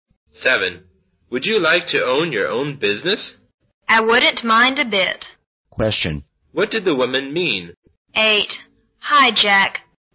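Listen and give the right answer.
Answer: She would like to own her own business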